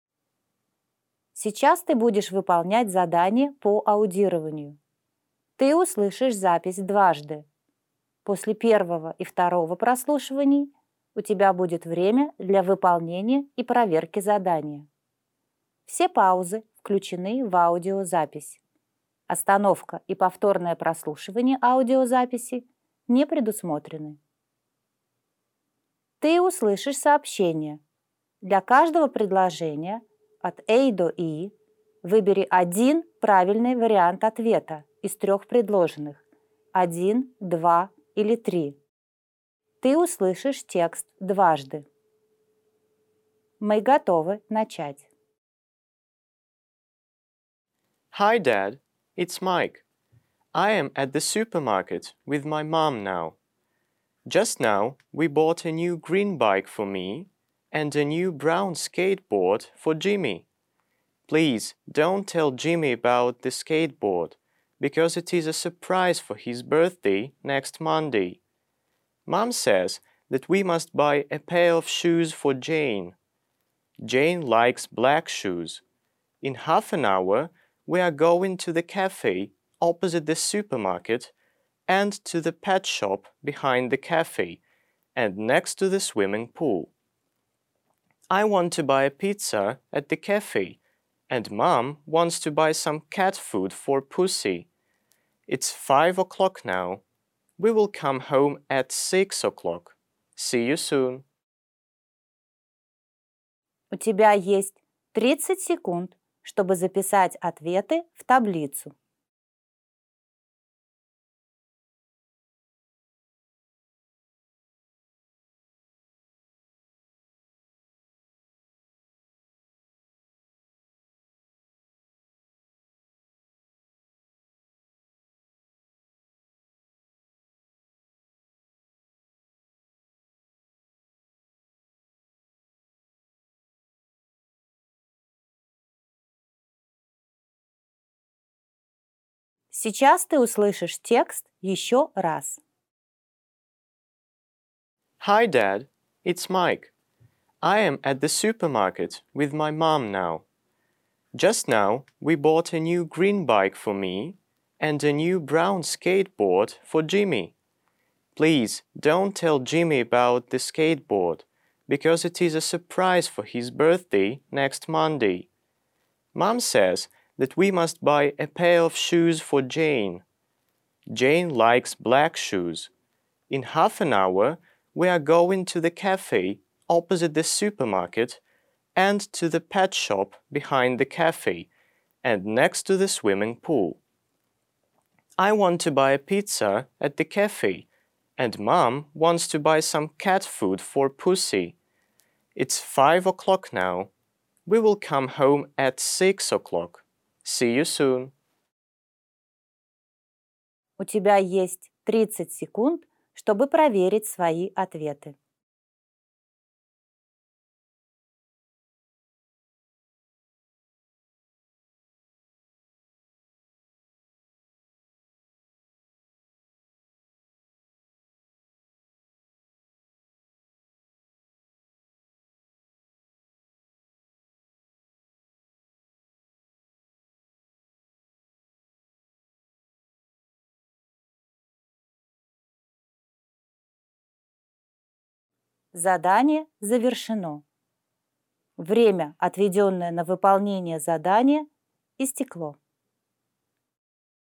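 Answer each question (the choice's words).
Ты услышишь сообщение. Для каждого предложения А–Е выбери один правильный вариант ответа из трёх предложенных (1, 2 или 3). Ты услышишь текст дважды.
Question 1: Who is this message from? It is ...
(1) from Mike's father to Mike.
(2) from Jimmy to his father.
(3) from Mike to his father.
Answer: from Mike to his father.

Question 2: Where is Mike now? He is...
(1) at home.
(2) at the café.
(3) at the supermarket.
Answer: at the supermarket.

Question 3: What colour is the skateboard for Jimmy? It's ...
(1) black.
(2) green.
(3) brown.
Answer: brown.

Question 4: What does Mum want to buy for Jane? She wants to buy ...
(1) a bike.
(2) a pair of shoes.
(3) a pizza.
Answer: a pair of shoes.

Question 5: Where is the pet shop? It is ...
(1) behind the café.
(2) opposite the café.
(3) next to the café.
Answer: behind the café.

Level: 4 класс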